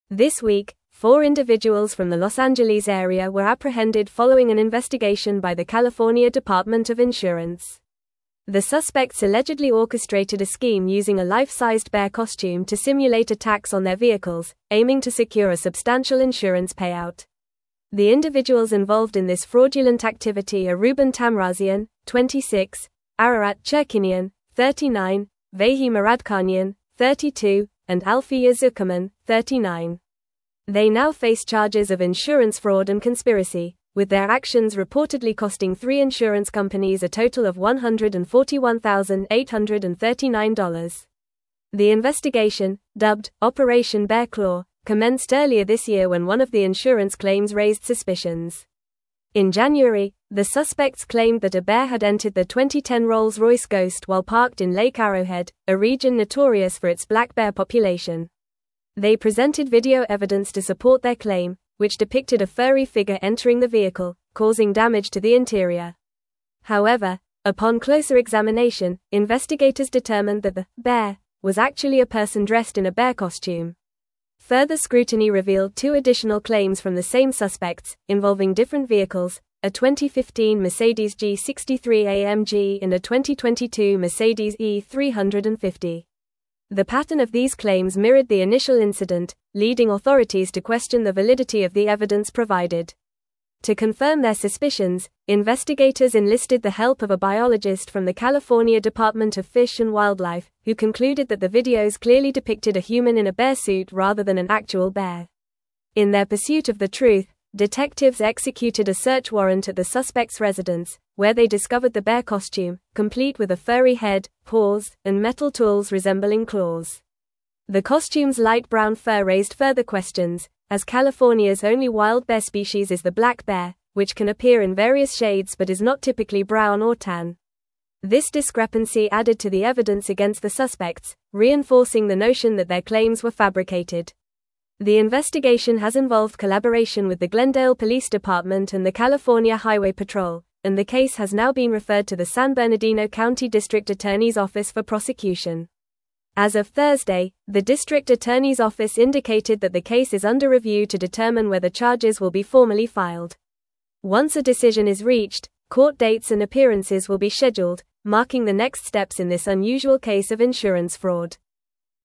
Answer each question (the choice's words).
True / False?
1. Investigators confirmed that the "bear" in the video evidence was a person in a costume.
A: True

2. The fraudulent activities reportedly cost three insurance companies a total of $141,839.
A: True

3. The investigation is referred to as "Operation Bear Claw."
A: True

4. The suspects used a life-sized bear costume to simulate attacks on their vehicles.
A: True

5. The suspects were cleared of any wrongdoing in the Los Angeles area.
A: False

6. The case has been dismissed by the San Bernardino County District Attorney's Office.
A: False

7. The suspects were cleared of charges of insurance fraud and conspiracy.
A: False

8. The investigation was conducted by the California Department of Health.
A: False

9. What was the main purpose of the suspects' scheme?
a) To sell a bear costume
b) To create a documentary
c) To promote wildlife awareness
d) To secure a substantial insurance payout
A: To secure a substantial insurance payout

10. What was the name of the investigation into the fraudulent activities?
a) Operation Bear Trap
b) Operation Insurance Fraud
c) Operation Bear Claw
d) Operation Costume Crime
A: Operation Bear Claw

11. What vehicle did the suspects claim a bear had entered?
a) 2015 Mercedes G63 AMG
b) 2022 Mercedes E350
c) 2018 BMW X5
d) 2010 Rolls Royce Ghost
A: 2010 Rolls Royce Ghost

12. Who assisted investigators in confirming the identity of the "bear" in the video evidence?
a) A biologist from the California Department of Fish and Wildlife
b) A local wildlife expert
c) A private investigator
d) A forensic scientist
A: A biologist from the California Department of Fish and Wildlife

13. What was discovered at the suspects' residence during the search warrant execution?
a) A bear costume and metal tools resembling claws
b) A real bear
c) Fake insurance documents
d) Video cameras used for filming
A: A bear costume and metal tools resembling claws

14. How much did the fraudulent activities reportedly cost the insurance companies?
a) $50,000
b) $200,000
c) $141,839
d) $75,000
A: $141,839

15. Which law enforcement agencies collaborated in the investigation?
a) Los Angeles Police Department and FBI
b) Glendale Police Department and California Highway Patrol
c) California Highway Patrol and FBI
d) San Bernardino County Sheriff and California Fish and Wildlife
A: Glendale Police Department and California Highway Patrol

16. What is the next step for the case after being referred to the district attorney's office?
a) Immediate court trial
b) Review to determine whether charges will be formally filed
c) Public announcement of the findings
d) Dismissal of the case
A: Review to determine whether charges will be formally filed

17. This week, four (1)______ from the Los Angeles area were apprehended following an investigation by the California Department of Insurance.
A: individuals

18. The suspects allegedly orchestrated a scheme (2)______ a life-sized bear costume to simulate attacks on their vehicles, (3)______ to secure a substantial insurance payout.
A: using

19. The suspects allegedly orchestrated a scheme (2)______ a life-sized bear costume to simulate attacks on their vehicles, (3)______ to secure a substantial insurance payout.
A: aiming

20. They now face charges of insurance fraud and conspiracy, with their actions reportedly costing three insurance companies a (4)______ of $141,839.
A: total

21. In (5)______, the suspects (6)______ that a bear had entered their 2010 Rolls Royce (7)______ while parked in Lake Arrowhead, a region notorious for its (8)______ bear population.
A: January

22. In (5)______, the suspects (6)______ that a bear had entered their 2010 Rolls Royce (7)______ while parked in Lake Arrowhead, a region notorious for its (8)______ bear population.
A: claimed

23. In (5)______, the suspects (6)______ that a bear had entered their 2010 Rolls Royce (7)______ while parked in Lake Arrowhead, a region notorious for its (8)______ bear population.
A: Ghost

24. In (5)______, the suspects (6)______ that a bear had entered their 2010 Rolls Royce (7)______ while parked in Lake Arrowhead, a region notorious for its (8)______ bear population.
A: black

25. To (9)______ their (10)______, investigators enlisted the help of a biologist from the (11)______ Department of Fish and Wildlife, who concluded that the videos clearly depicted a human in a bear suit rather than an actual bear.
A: confirm

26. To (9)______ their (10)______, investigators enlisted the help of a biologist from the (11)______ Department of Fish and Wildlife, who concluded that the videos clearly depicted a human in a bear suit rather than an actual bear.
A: suspicions

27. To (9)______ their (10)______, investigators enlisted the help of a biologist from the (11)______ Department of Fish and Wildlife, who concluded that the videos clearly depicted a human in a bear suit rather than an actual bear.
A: California

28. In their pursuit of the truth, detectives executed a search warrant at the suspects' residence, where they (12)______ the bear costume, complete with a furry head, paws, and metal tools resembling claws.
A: discovered

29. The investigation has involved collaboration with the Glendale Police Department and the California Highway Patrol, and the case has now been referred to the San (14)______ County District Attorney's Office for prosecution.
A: Bernardino

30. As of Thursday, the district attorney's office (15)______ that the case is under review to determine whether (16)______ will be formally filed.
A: indicated

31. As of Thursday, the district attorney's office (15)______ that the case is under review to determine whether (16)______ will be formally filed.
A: charges

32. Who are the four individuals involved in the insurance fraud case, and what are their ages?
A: The individuals involved are Ruben Tamrazian, 26; Ararat Chirkinian, 39; Vahe Muradkhanyan, 32; and Alfiya Zuckerman, 39.

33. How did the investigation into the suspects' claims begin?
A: The investigation began when one of the insurance claims raised suspicions earlier this year.

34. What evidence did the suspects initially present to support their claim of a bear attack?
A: The suspects presented video evidence that depicted a furry figure entering their vehicle, which they claimed was a bear causing damage to the interior.

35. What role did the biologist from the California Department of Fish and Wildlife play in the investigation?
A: The biologist helped confirm investigators' suspicions by concluding that the videos clearly depicted a human in a bear suit rather than an actual bear.

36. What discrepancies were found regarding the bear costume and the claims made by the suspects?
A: The bear costume was light brown, which raised questions since California's only wild bear species is the black bear, typically not brown or tan.

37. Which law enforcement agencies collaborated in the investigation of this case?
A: The investigation involved collaboration with the Glendale Police Department and the California Highway Patrol.

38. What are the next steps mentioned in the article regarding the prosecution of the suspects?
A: The case has been referred to the San Bernardino County District Attorney's Office for prosecution, which is currently under review to determine whether charges will be formally filed and to schedule court dates and appearances.

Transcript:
This week, four individuals from the Los Angeles area were apprehended following an investigation by the California Department of Insurance. The suspects allegedly orchestrated a scheme using a life-sized bear costume to simulate attacks on their vehicles, aiming to secure a substantial insurance payout. The individuals involved in this fraudulent activity are Ruben Tamrazian, 26; Ararat Chirkinian, 39; Vahe Muradkhanyan, 32; and Alfiya Zuckerman, 39. They now face charges of insurance fraud and conspiracy, with their actions reportedly costing three insurance companies a total of $141,839.
The investigation, dubbed "Operation Bear Claw," commenced earlier this year when one of the insurance claims raised suspicions. In January, the suspects claimed that a bear had entered their 2010 Rolls Royce Ghost while parked in Lake Arrowhead, a region notorious for its black bear population. They presented video evidence to support their claim, which depicted a furry figure entering the vehicle, causing damage to the interior. However, upon closer examination, investigators determined that the "bear" was actually a person dressed in a bear costume.
Further scrutiny revealed two additional claims from the same suspects, involving different vehicles—a 2015 Mercedes G63 AMG and a 2022 Mercedes E350. The pattern of these claims mirrored the initial incident, leading authorities to question the validity of the evidence provided. To confirm their suspicions, investigators enlisted the help of a biologist from the California Department of Fish and Wildlife, who concluded that the videos clearly depicted a human in a bear suit rather than an actual bear.
In their pursuit of the truth, detectives executed a search warrant at the suspects' residence, where they discovered the bear costume, complete with a furry head, paws, and metal tools resembling claws. The costume's light brown fur raised further questions, as California's only wild bear species is the black bear, which can appear in various shades but is not typically brown or tan. This discrepancy added to the evidence against the suspects, reinforcing the notion that their claims were fabricated.
The investigation has involved collaboration with the Glendale Police Department and the California Highway Patrol, and the case has now been referred to the San Bernardino County District Attorney's Office for prosecution. As of Thursday, the district attorney's office indicated that the case is under review to determine whether charges will be formally filed. Once a decision is reached, court dates and appearances will be scheduled, marking the next steps in this unusual case of insurance fraud.

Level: Level 4